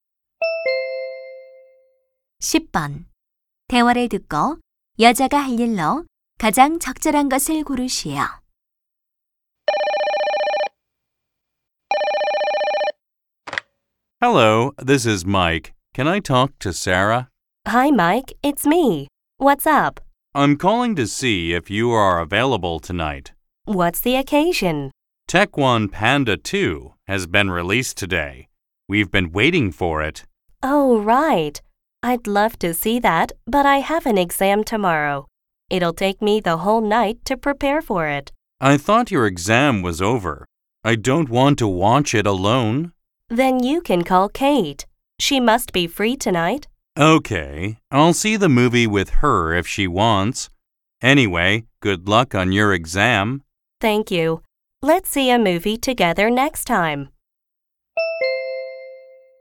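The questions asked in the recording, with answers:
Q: 대화를 듣고 여자가 할 일로 가장 적절한 것을 고르시오.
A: 시험 공부하기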